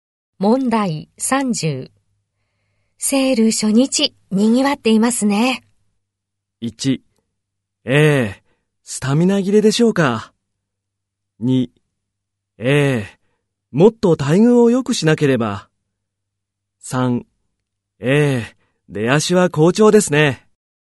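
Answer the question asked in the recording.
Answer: 3: ええ、出足は好調ですね。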